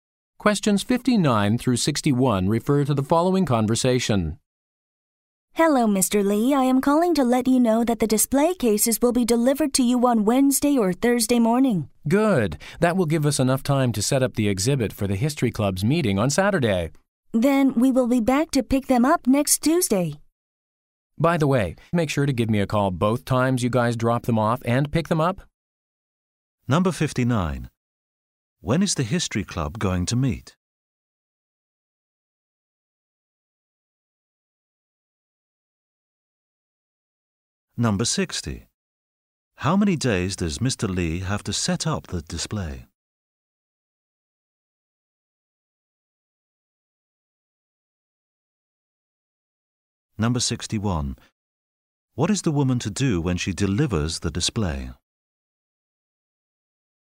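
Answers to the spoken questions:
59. On Saturday
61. Call Mr. Lee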